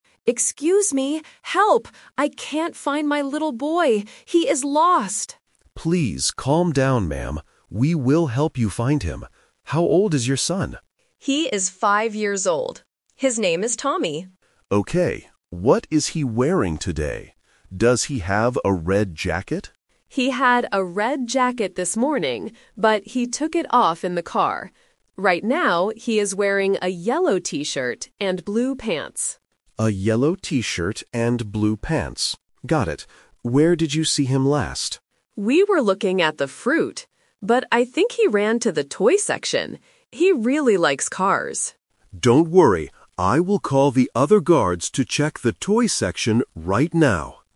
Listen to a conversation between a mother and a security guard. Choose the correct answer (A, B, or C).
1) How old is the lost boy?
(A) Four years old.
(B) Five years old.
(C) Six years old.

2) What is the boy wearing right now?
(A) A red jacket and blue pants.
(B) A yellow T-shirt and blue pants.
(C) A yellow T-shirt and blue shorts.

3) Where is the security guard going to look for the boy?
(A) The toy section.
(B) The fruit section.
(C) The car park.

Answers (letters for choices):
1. B
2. B
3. A

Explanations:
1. The mother clearly states her son's age: "He is five years old." Trap: There is no specific trap here; it's a detail question to test basic listening comprehension for numbers. Options A and C are distractors.
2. The mother describes his current clothes: "Right now, he is wearing a yellow T-shirt and blue pants." Trap (The Twist): Option A (A red jacket) is a strong trap. The guard asks about a red jacket, but the mother says he "took it off in the car." Option C uses the wrong bottom piece ("shorts" instead of "pants").
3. The mother thinks he ran to the toy section, and the guard confirms: "I will call the other guards to check the toy section right now." Trap (The Twist): Option B (The fruit section) is the trap. They were at the fruit section, but the boy is no longer there. Option C (The car park) is where he left his jacket, not where he is now.

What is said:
Mother: Excuse me! Help! I can't find my little boy. He is lost!
Security Guard: Please calm down, ma'am. We will help you find him. How old is your son?
Mother: He is five years old. His name is Tommy.
Security Guard: Okay. What is he wearing today? Does he have a red jacket?
Mother: He had a red jacket this morning, but he took it off in the car. Right now, he is wearing a yellow T-shirt and blue pants.
Security Guard: A yellow T-shirt and blue pants. Got it. Where did you see him last?
Mother: We were looking at the fruit. But I think he ran to the toy section. He really likes cars.
Security Guard: Don't worry. I will call the other guards to check the toy section right now.